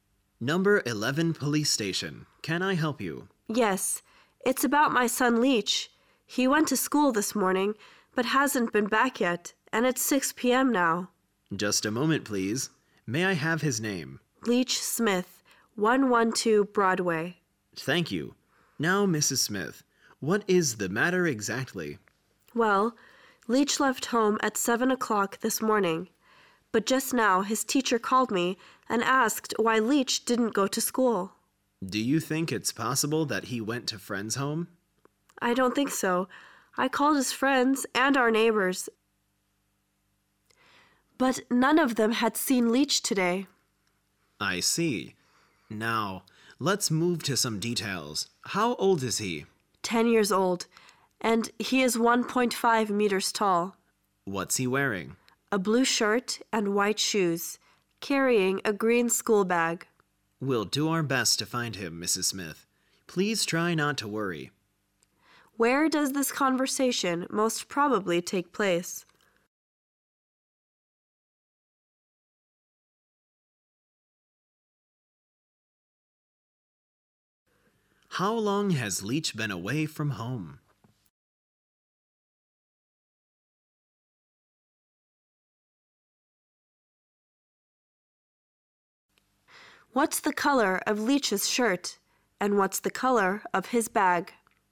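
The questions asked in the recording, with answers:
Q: Where does this conversation most probably take place?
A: At a police station

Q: How long has Leech been away from home?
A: 11 hours

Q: What's the color of Leech's shirt?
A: Blue

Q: And what's the color of his bag?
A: Green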